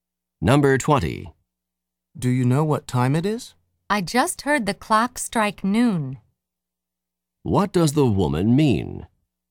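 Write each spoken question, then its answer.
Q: What does the woman mean?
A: It is about noon.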